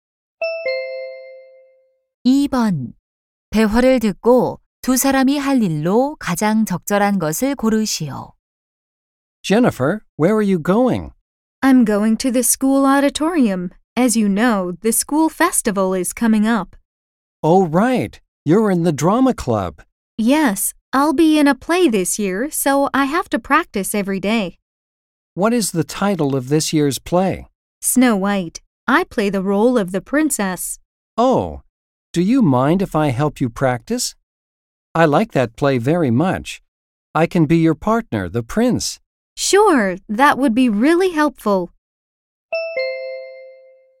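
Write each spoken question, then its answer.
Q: 대화를 듣고 두 사람이 할 일로 가장 적절한 것을 고르시오.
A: 연극 연습하기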